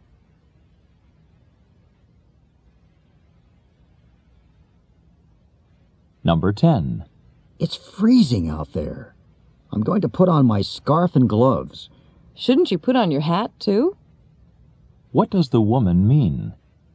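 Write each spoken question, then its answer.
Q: What does the woman mean?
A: The man should wear his hat too.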